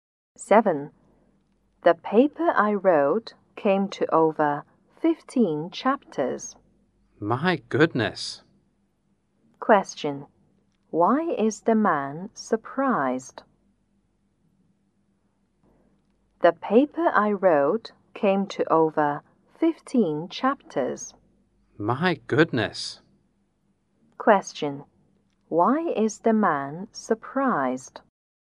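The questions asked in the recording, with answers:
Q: Question. Why is the man surprised?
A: The woman's paper was very long, over 15 chapters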